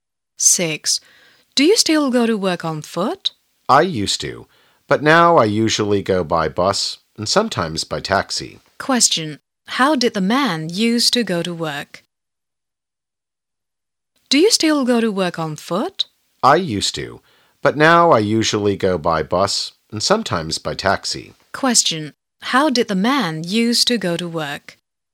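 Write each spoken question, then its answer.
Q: How did the man used to go to work?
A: On foot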